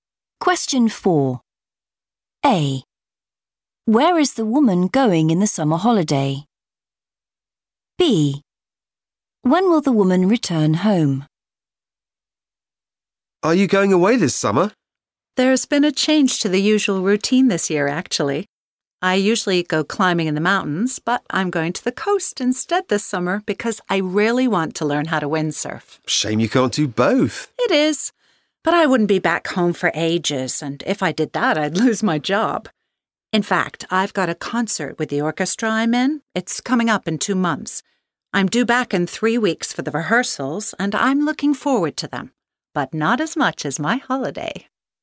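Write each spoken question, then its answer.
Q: Where is the woman going in the summer holiday?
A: the coast

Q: When will the woman return home?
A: in 3 weeks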